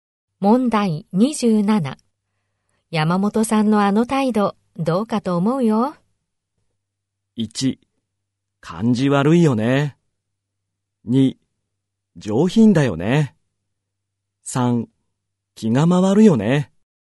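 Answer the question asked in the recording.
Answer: 1: 感じ悪いよね。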